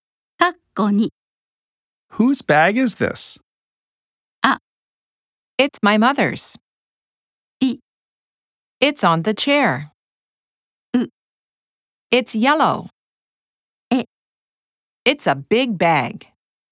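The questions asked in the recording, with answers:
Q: Whose bag is this?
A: あ: It's my mother's.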